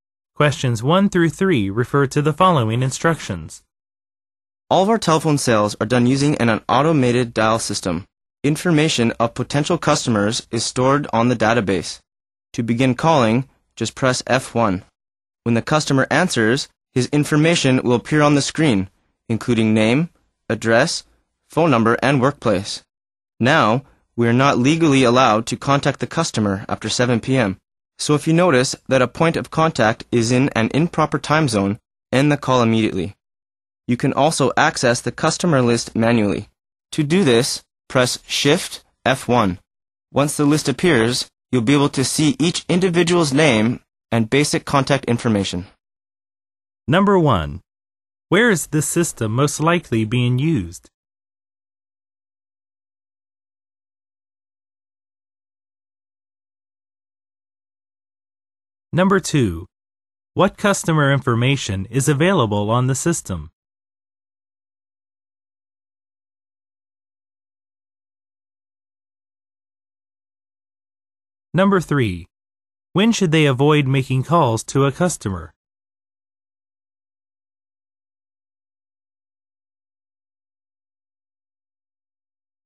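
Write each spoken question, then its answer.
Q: Where is this system most likely being used?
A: In a telephone sales office

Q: What customer information is available on the system?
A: Name, address, phone number, and workplace

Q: When should they avoid making calls to a customer?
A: After 7 p.m. in the customer's time zone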